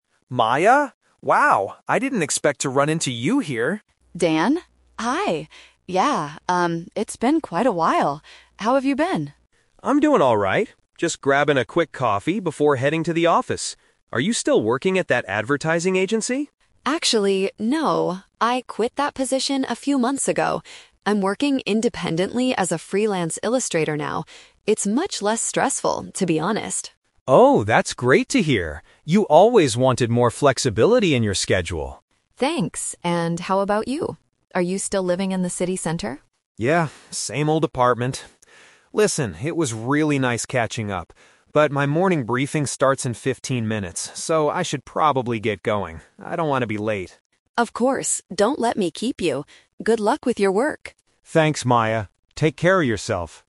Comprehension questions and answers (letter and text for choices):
Listen to a conversation between two people who used to date. Choose the best answer (A, B, or C) for each question.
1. What is Maya's current employment situation?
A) She is employed at an advertising firm.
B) She works for herself as an artist.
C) She is looking for a job with a flexible schedule.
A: B) She works for herself as an artist.

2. What do we learn about Dan's living arrangement?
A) He still resides in his previous home.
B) He recently moved to the city center.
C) He shares an apartment with a coworker.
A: A) He still resides in his previous home.

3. Why does Dan end the conversation?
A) He feels too uncomfortable talking to his ex-girlfriend.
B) He has to catch a bus to get to his office.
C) He needs to attend an upcoming work meeting.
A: C) He needs to attend an upcoming work meeting.

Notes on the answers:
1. Maya says she is "working independently as a freelance illustrator." Working for herself is a paraphrase for "working independently/freelance", and an artist is a synonym for an "illustrator". Trap: Option A is a trap. Dan asks if she still works at the "advertising agency", but she explicitly says "Actually, no. I quit that position." Option C is incorrect; she already has a flexible job, she isn't looking for one.
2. When asked if he is still living in the city center, Dan replies, "Yeah, same old apartment." Residing in his previous home perfectly paraphrases staying in the same old apartment. Trap: Option B is a trap because he has lived in the city center for a while; he didn't "recently move" there. Option C is a distractor (not mentioned in the audio).
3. Dan says he has to leave because his "morning briefing starts in fifteen minutes." A morning briefing is a type of work meeting. Trap: Option A might be true in his head (it's an awkward encounter), but it is not the excuse he gives. Option B is a trap because he mentions "heading to the office," but he doesn't mention catching a bus.

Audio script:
Dan: Maya? Wow, I didn't expect to run into you here.
Maya: Dan! Hi. Yeah, um, it's been quite a while. How have you been?
Dan: I'm doing alright. Just grabbing a quick coffee before heading to the office. Are you still working at that advertising agency?
Maya: Actually, no. I quit that position a few months ago. I'm working independently as a freelance illustrator now. It's much less stressful, to be honest.
Dan: Oh, that's great to hear. You always wanted more flexibility in your schedule.
Maya: Thanks. And how about you? Are you still living in the city center?
Dan: Yeah, same old apartment. Listen, it was really nice catching up, but my morning briefing starts in fifteen minutes, so I should probably get going. I don't want to be late.
Maya: Of course, don't let me keep you. Good luck with your work!